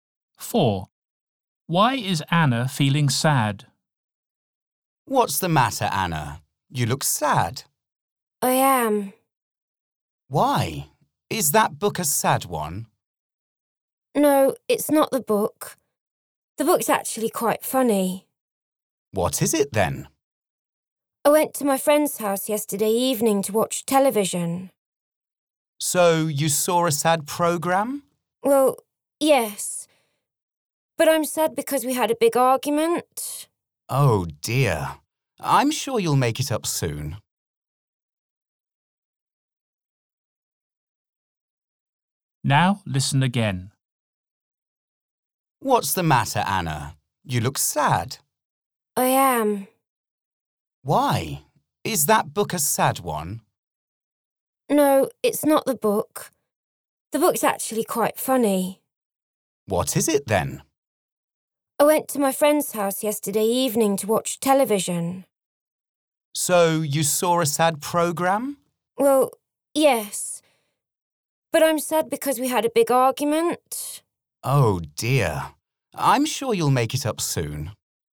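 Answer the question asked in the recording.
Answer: She had a big argument with her friend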